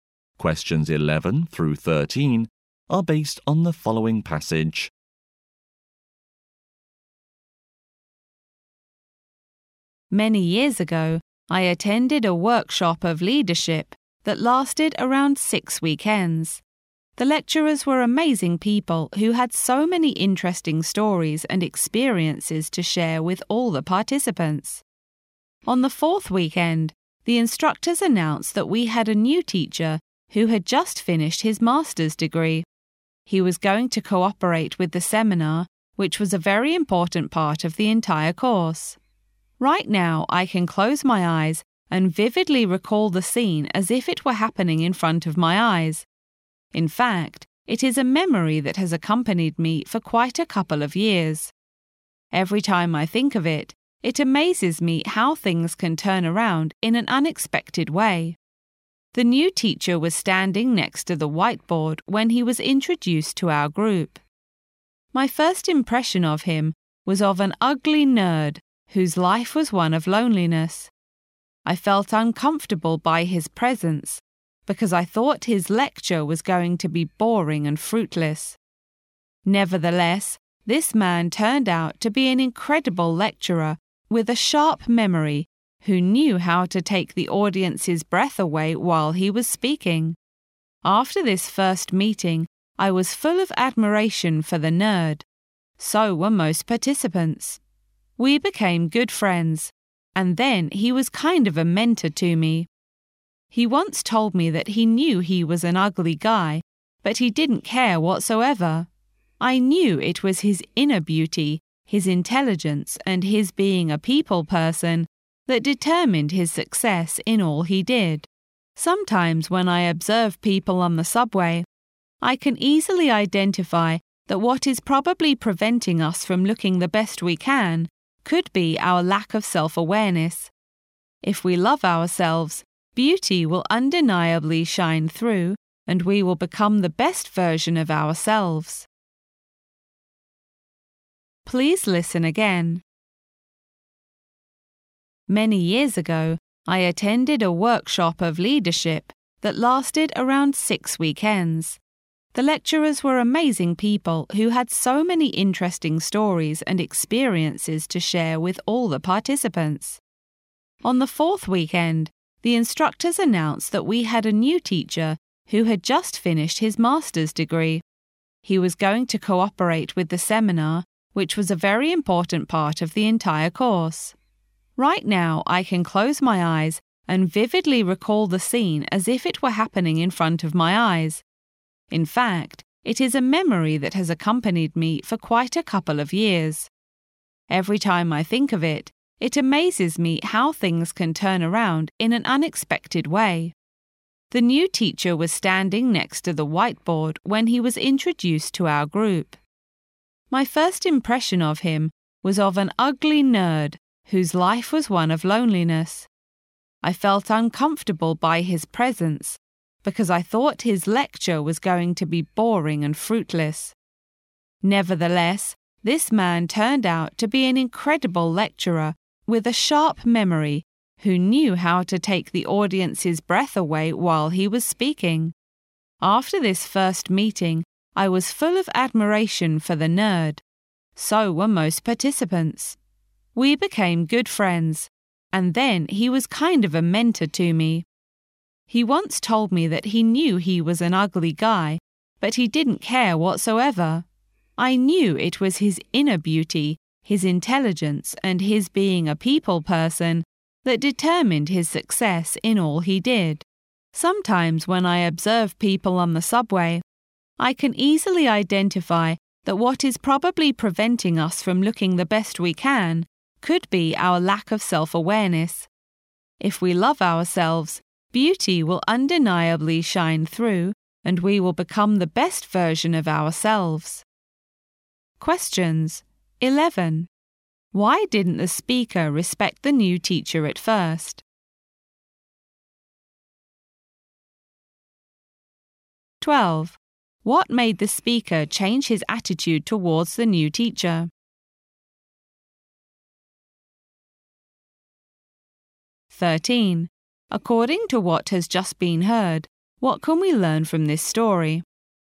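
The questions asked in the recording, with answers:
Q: Why didn't the speaker respect the new teacher at first?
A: He looked like an ugly nerd, and the speaker thought his lecture would be boring.

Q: What made the speaker change his attitude towards the new teacher?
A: His incredible lecturing and sharp memory

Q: According to what has just been heard, what can we learn from this story?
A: Inner beauty and loving yourself matter more than looks.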